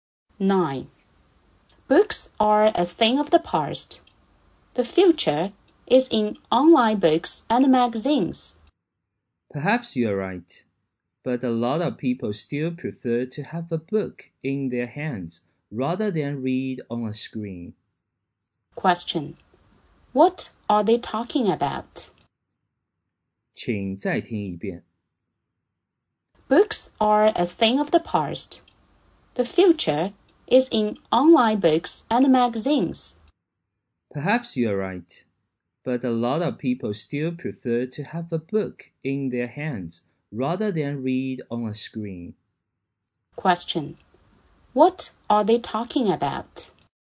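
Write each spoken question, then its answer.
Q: What are they talking about?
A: Printed books versus online reading.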